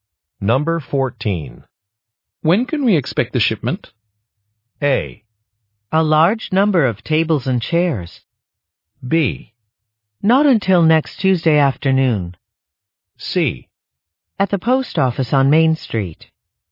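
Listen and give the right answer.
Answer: B: Not until next Tuesday afternoon.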